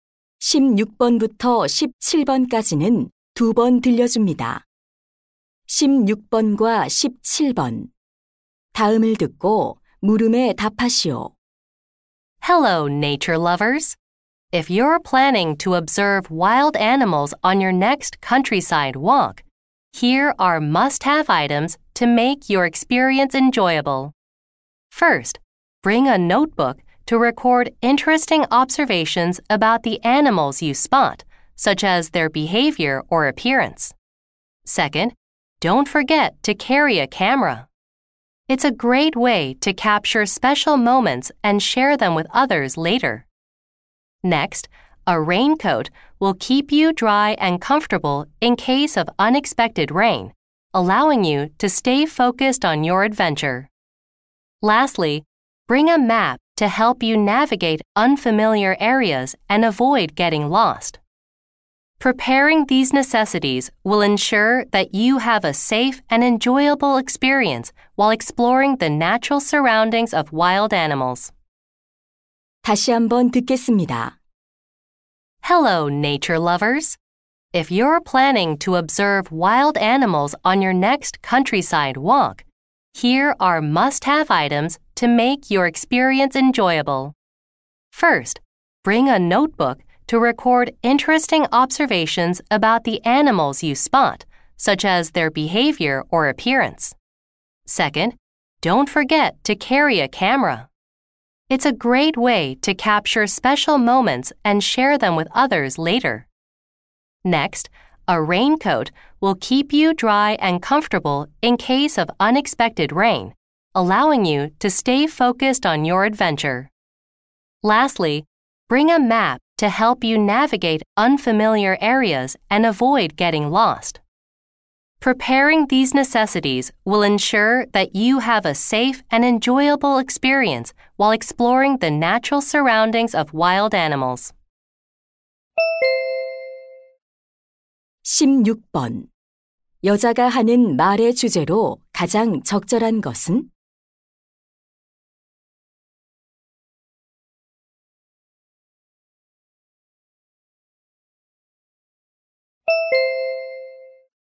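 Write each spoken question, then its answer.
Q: 여자가 하는 말의 주제로 가장 적절한 것은?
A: 야생 동물 관찰 산책에 필요한 준비물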